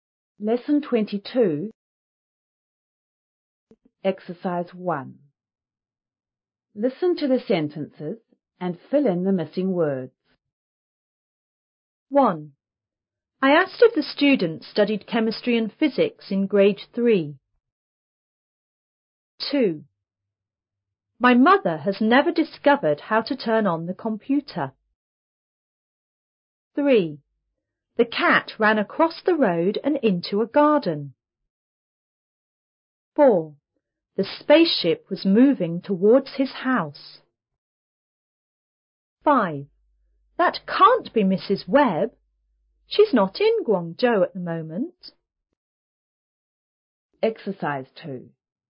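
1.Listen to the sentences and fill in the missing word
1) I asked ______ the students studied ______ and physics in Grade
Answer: if; chemistry

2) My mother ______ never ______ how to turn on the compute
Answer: has; discovered

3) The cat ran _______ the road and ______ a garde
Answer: across; into

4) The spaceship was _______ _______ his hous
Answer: moving towards

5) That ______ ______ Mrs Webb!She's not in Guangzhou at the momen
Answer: can't be

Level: 5B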